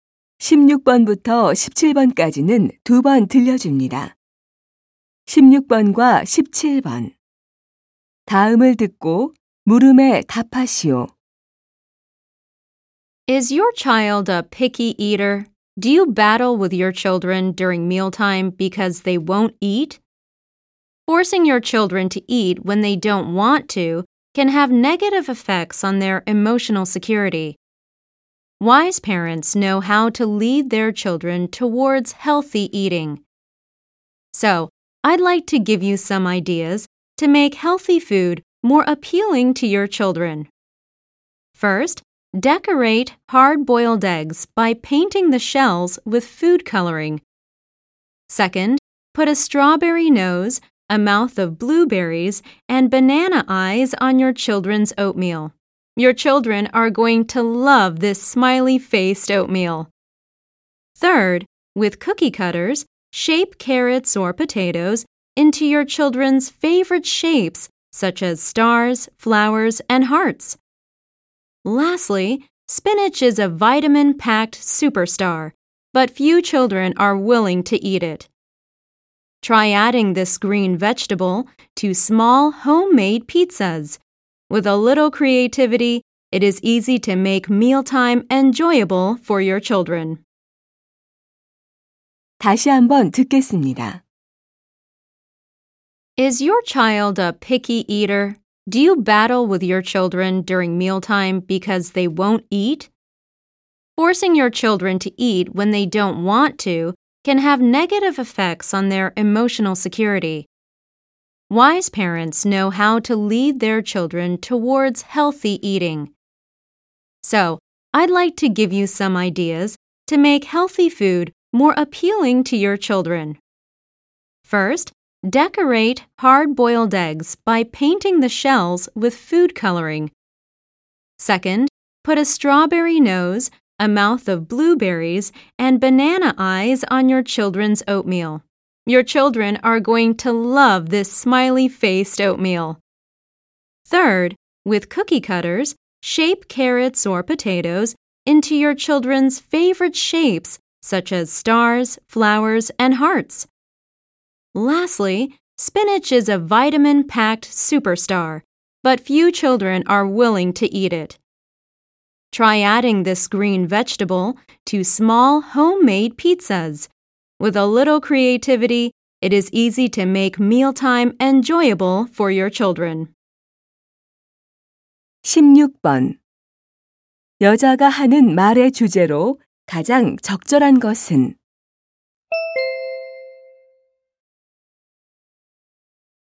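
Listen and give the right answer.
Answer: 아이들에게 건강한 음식을 더 먹음직스럽게 만드는 방법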